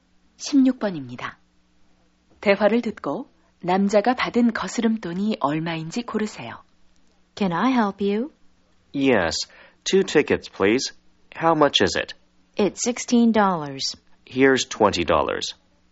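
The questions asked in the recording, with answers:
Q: 대화를 듣고 남자가 받은 거스름돈이 얼마인지 고르세요.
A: 4달러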